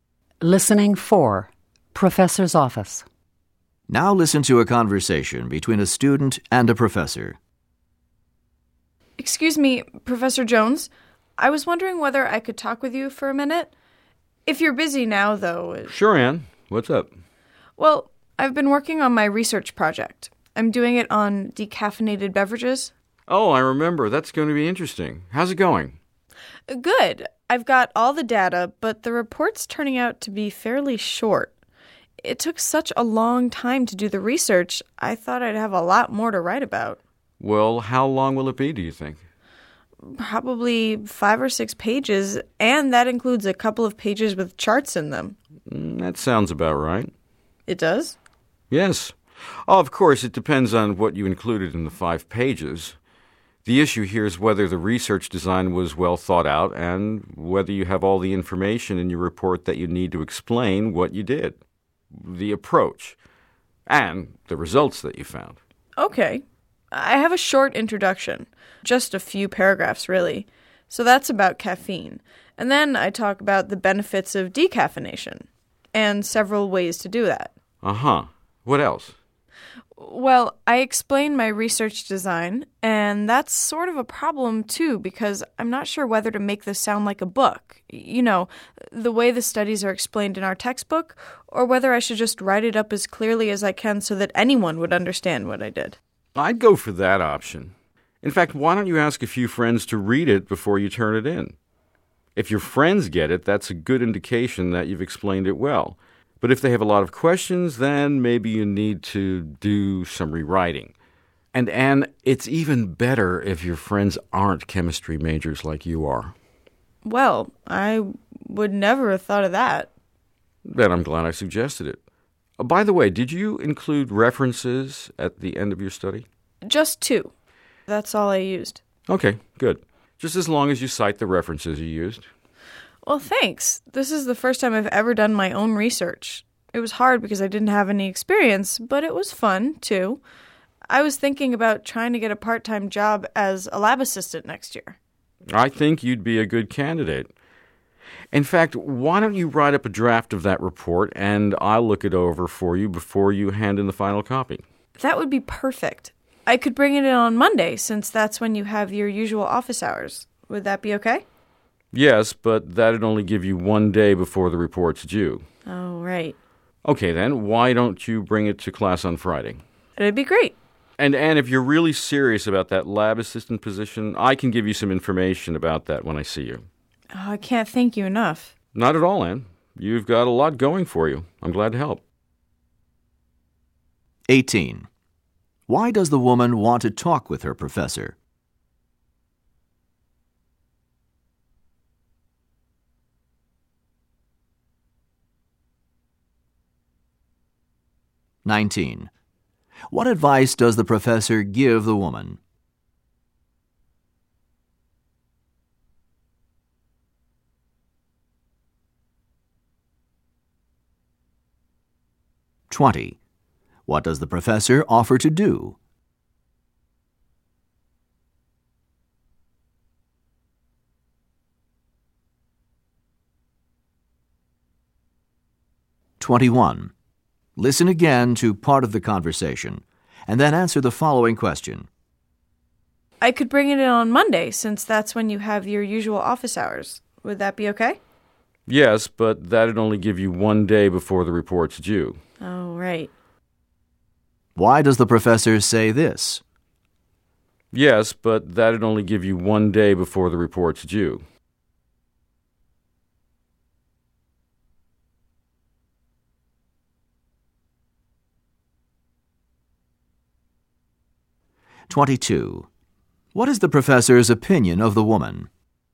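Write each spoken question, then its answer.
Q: Why does the woman want to talk with her professor?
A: She is worried that her research report is too short

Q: What advice does the professor give the woman?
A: Ask friends who are not chemistry majors to read her report

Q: What does the professor offer to do?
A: Look over a draft of her report

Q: What is the professor's opinion of the woman?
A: She is a capable student and a good candidate for a lab assistant job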